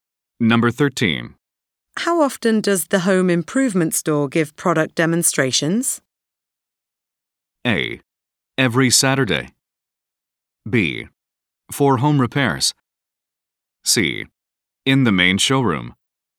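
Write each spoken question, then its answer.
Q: How often does the home improvement store give product demonstrations?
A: A: Every Saturday.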